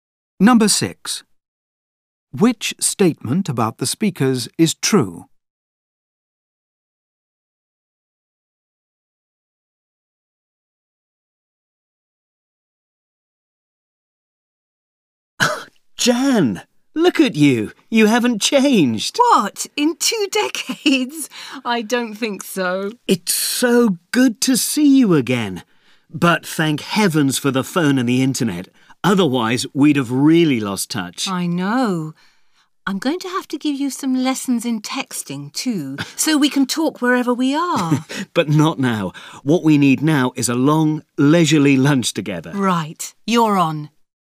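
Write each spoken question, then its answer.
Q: Which statement about the speakers is true?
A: They are old friends meeting for the first time in 20 years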